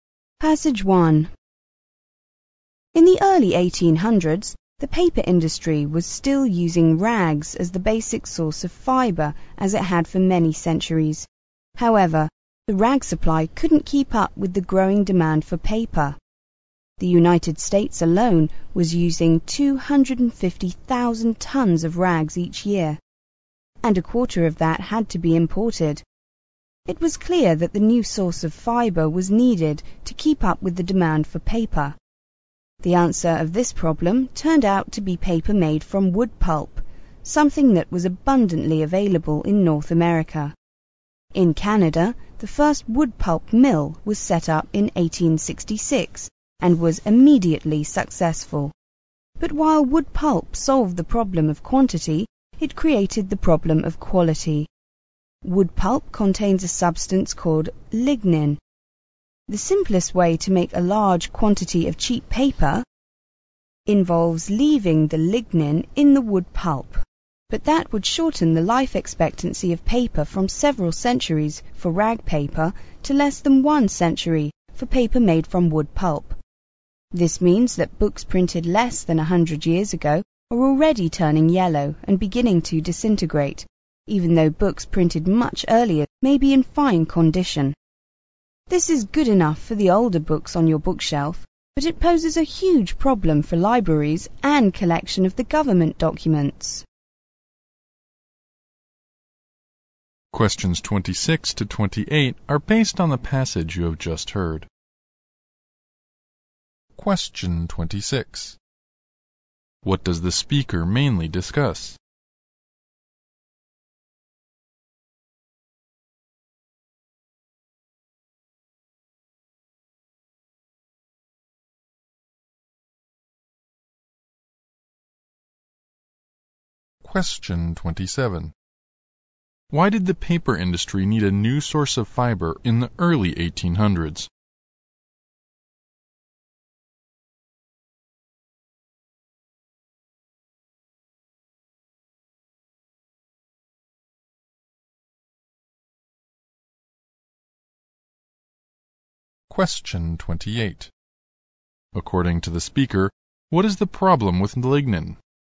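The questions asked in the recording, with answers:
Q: What does the speaker mainly discuss?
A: The change from rags to wood pulp in papermaking and its problems

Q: Why did the paper industry need a new source of fiber in the early 1800s?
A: The rag supply couldn't keep up with demand for paper

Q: According to the speaker, what is the problem with lignin?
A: It shortens paper's life, making it yellow and disintegrate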